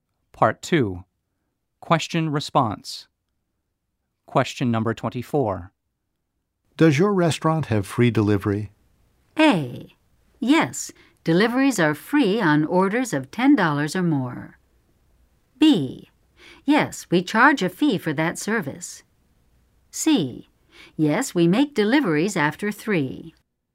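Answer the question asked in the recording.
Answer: A: Yes, deliveries are free on orders of $10 or more.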